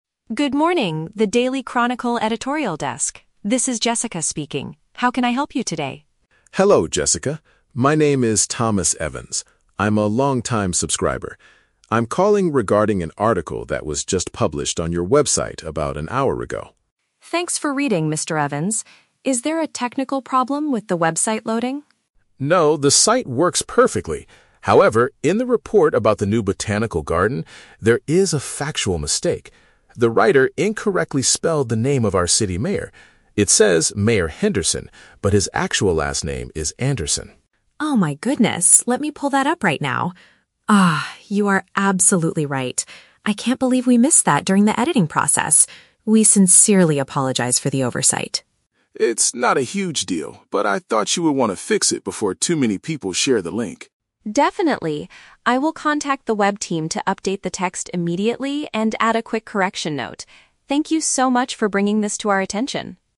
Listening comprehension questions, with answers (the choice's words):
Listen to a phone conversation between a reader and a newspaper employee. Choose the correct answer (A, B, or C) for each question.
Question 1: What is the main reason for the man's call?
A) To complain about a technical issue with the news website.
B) To point out an inaccurate detail in a recent news story.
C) To suggest a new topic about the city's botanical garden.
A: To point out an inaccurate detail in a recent news story.

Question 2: Whose name was written incorrectly in the article?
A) The journalist who wrote the story.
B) A long-time newspaper subscriber.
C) A local government official.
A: A local government official.

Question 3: What will Jessica do to solve the problem?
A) Publish a formal apology in tomorrow's printed newspaper.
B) Have the online document modified to show the right information.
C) Ask the original writer to rewrite the entire article from the beginning.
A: Have the online document modified to show the right information.

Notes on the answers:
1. Mr. Evans states that in the report, "there is a factual mistake" (an inaccurate detail). Option B paraphrases this perfectly. Option A is the Trap: Jessica asks if there is a "technical problem with the website", but Mr. Evans replies, "No, the site works perfectly." Option C is also a Trap: The "botanical garden" is the topic of the article, but he is not suggesting a new topic; he is correcting an old one.
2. The mistake is regarding the spelling of the "city mayor". Option C uses a broader term (local government official = city mayor) to test vocabulary. Option A is not mentioned as having a spelling error. Option B is the Trap: Mr. Evans introduces himself as a "long-time subscriber", but it is not his name that was misspelled.
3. Jessica promises to contact the web team to "update the text immediately". Option B paraphrases this action (update the text = modify the online document). Option A is the Trap: Jessica mentions adding a "correction note", but it will be on the website, not in "tomorrow's printed newspaper". Option C is an extreme action that is not mentioned in the audio.

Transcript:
Jessica: Good morning, The Daily Chronicle editorial desk. This is Jessica speaking. How can I help you today?
Mr. Evans: Hello, Jessica. My name is Thomas Evans. I'm a long-time subscriber. I'm calling regarding an article that was just published on your website about an hour ago.
Jessica: Thanks for reading, Mr. Evans. Is there a technical problem with the website loading?
Mr. Evans: No, the site works perfectly. However, in the report about the new botanical garden, there is a factual mistake. The writer incorrectly spelled the name of our city mayor. It says "Mayor Henderson", but his actual last name is "Anderson".
Jessica: Oh my goodness, let me pull that up right now. Ah, you are absolutely right. I can't believe we missed that during the editing process. We sincerely apologize for the oversight.
Mr. Evans: It's not a huge deal, but I thought you would want to fix it before too many people share the link.
Jessica: Definitely. I will contact the web team to update the text immediately and add a quick correction note. Thank you so much for bringing this to our attention!